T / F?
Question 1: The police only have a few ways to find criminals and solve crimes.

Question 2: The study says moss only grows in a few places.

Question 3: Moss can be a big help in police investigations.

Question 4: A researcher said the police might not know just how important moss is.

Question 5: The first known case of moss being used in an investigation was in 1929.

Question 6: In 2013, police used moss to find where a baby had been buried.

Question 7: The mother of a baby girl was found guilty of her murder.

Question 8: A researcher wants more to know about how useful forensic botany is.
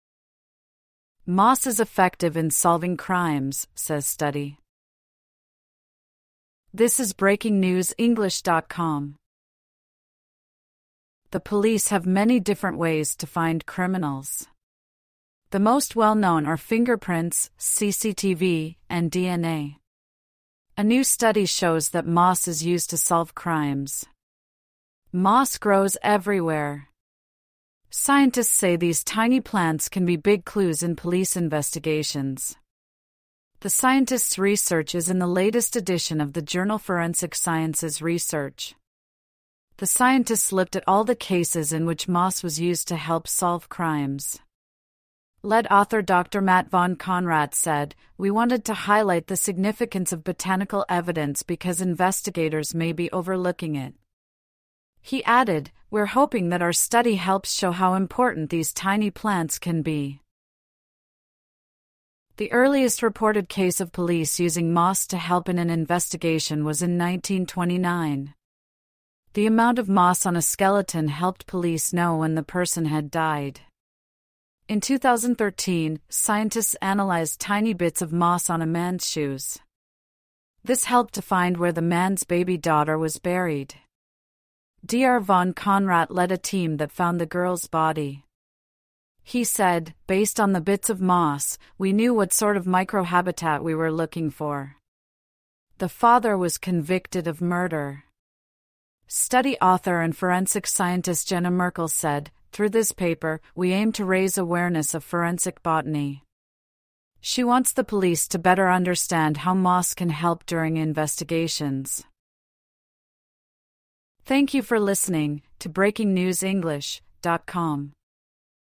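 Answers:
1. F
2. F
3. T
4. T
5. T
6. T
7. F
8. T

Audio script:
(1/12) Moss is effective in solving crimes, says study
The police have many different ways to find criminals. The most well-known are fingerprints, CCTV, and DNA. A new study shows that moss is used to solve crimes. Moss grows everywhere. Scientists say these tiny plants can be big clues in police investigations. The scientists' research is in the latest edition of the journal Forensic Sciences Research. The scientists looked at all the cases in which moss was used to help solve crimes. Lead author Dr Matt von Konrat said: "We wanted to highlight the significance of botanical evidence because...investigators may be overlooking it." He added: "We're hoping that our study helps show how important these tiny plants can be."
The earliest reported case of police using moss to help in an investigation was in 1929. The amount of moss on a skeleton helped police know when the person had died. 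In 2013, scientists analyzed tiny bits of moss on a man's shoes. This helped to find where the man's baby daughter was buried. Dr von Konrat led a team that found the girl's body. He said: "Based on the bits of moss, we knew what sort of micro-habitat we were looking for." The father was convicted of murder. Study author and forensic scientist Jenna Merkel said: "Through this paper, we aim to raise awareness of forensic botany." She wants the police to better understand how moss can help during investigations.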